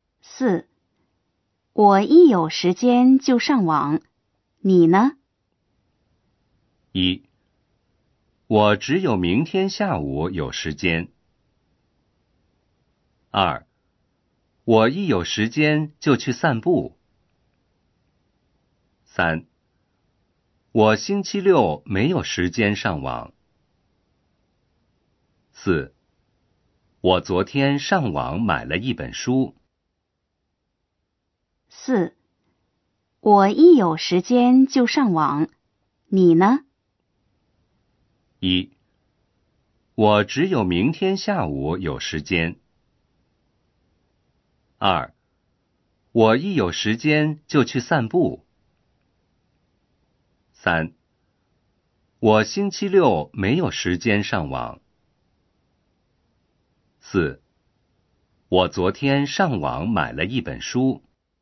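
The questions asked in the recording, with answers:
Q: 我一有时间就上网,你呢?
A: 2: 我一有时间就去散步。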